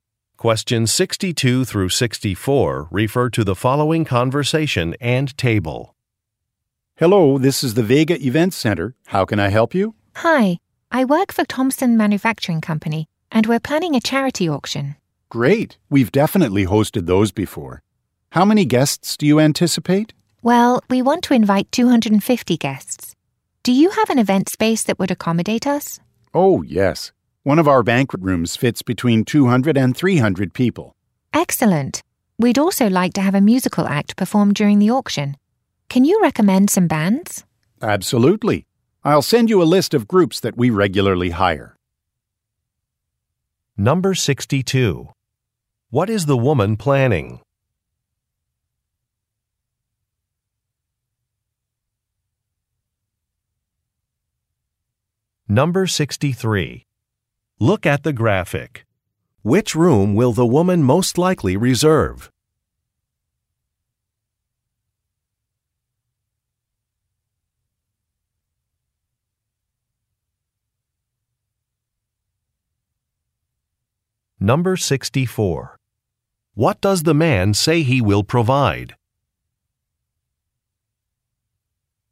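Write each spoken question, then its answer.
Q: What is the woman planning?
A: A charity auction

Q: What does the man say he will provide?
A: A list of bands (musical groups) they regularly hire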